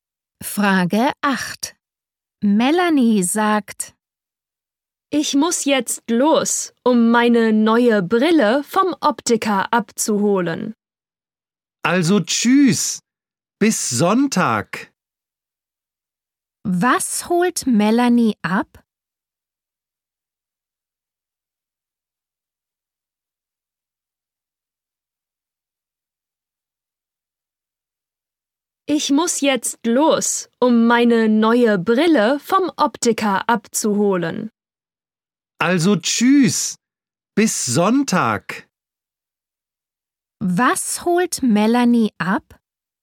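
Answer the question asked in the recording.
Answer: Ihre neue Brille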